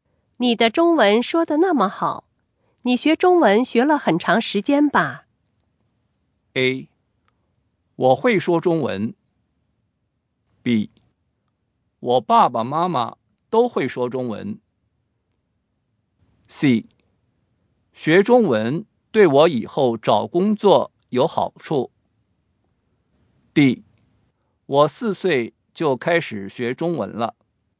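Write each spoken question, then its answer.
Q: 你的中文说得那么好,你学中文学了很长时间吧?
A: D: 我四岁就开始学中文了。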